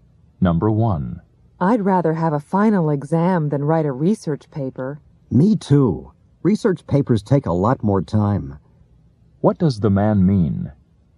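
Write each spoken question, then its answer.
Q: What does the man mean?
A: He would also prefer a final exam to a research paper.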